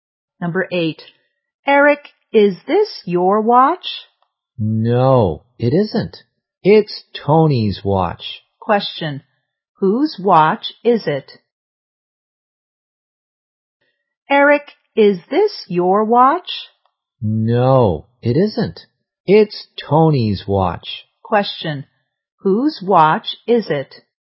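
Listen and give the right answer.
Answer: Tony's.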